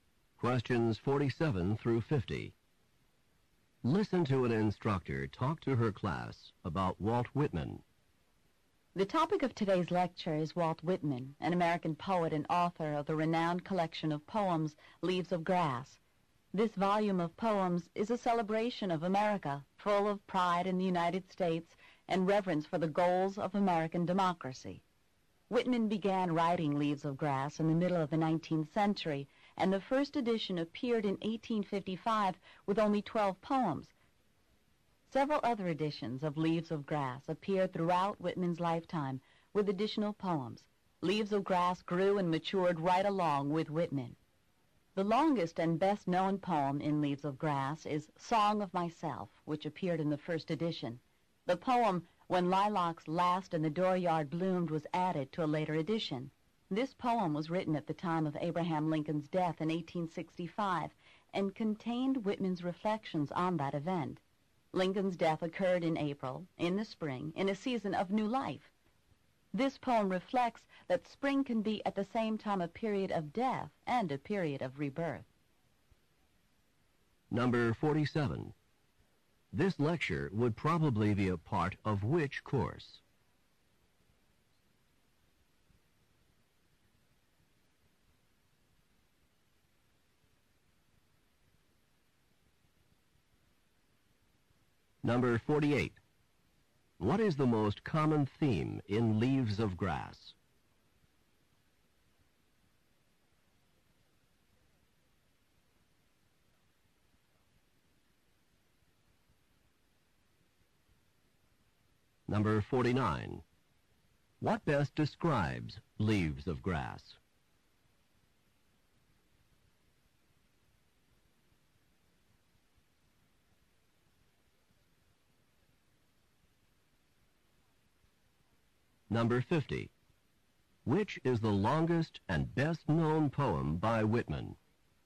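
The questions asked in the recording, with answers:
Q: This lecture would probably be a part of which course?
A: American literature

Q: What is the most common theme in Leaves of Grass?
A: A celebration of America and its democracy

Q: Which is the longest and best-known poem by Whitman?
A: Song of Myself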